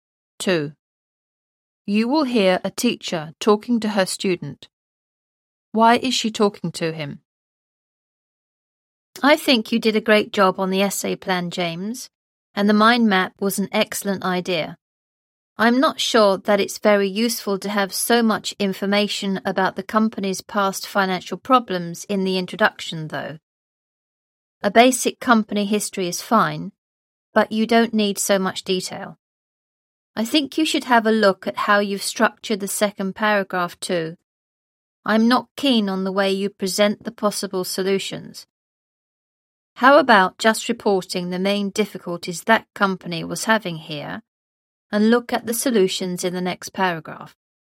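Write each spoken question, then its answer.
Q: Why is she talking to him?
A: To suggest improvements to his essay plan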